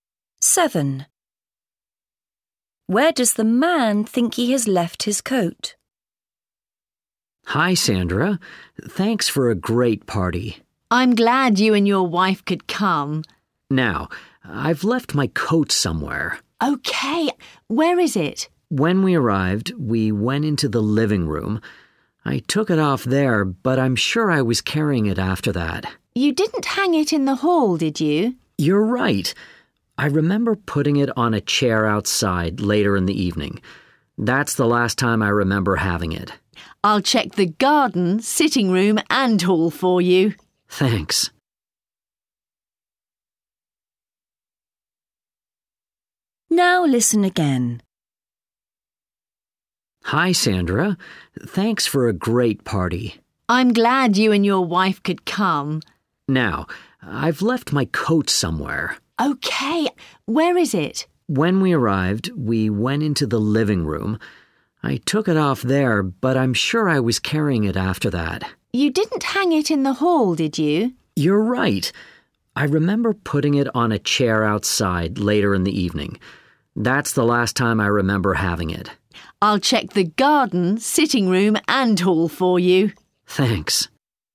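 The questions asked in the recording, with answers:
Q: Where does the man think he has left his coat?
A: In the garden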